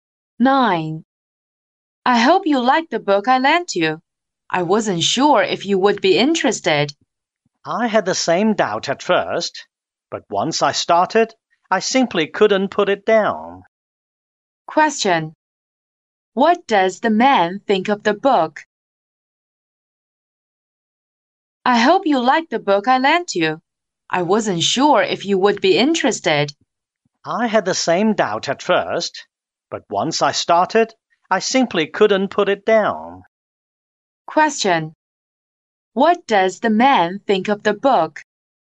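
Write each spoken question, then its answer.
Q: What does the man think of the book?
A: He finds it very interesting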